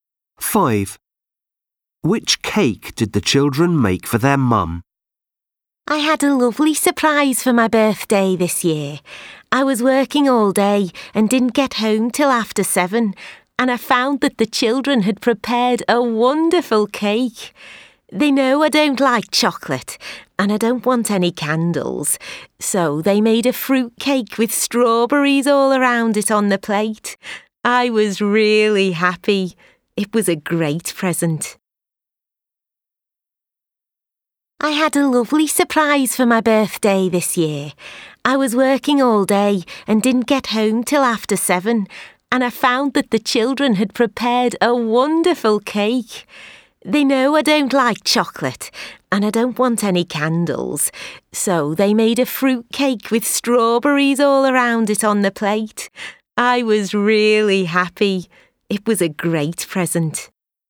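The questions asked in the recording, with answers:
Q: Which cake did the children make for their mum?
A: A fruit cake with strawberries around it, no candles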